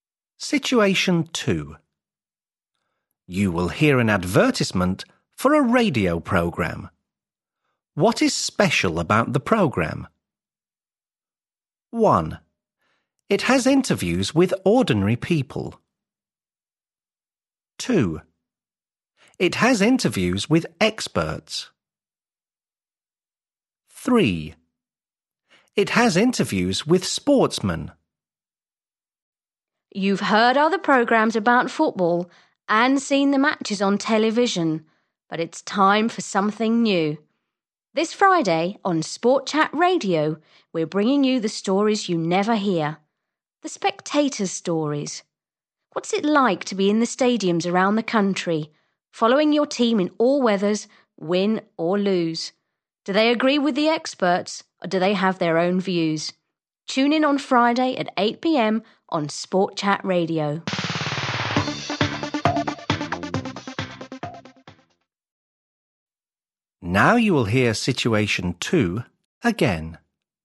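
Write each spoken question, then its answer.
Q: What is special about the program?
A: 1: It has interviews with ordinary people.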